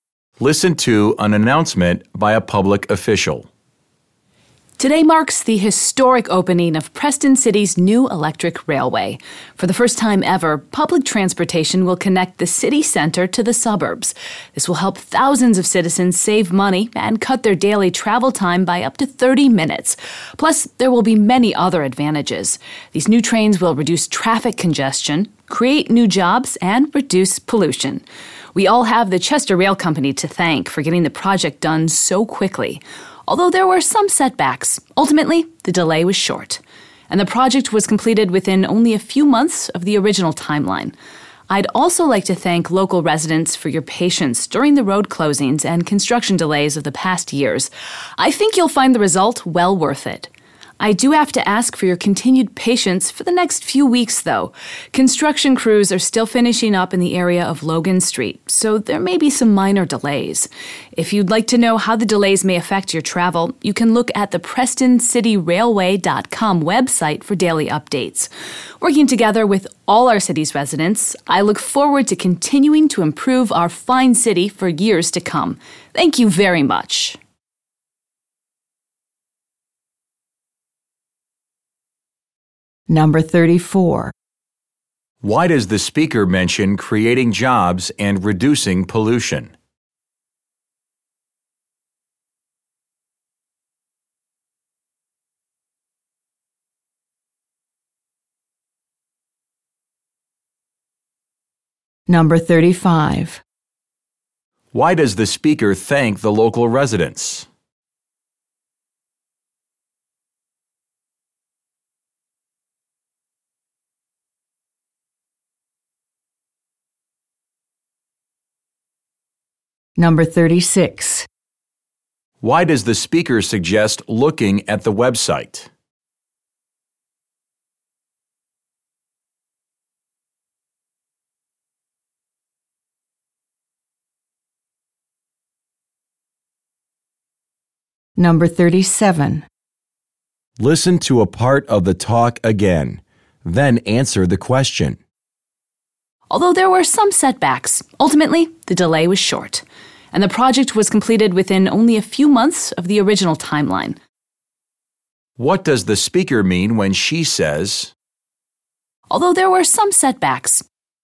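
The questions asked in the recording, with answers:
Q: Why does the speaker mention creating jobs and reducing pollution?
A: To point out other advantages of the new railway

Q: Why does the speaker thank the local residents?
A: For their patience during road closings and construction delays

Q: Why does the speaker suggest looking at the website?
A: To get daily updates on how delays may affect travel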